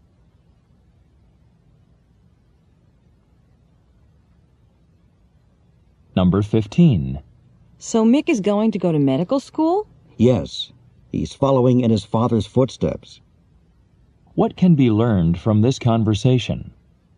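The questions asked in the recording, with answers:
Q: What can be learned from this conversation?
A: Mick's father is a doctor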